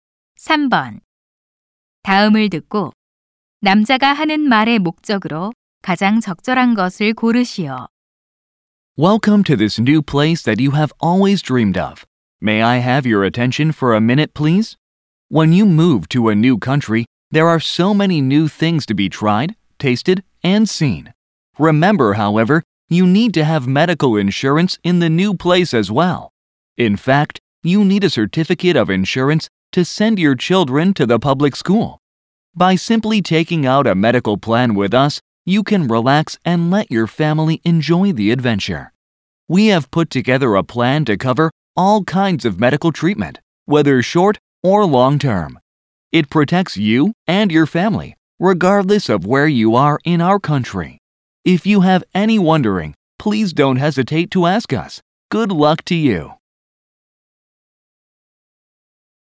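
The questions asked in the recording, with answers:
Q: 다음을 듣고 남자가 하는 말의 목적으로 가장 적절한 것을 고르시오.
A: 의료 보험 가입을 권유하려고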